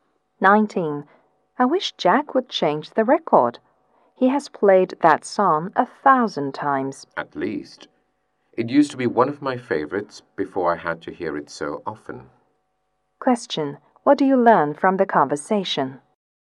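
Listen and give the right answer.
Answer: They are tired of hearing the song Jack keeps playing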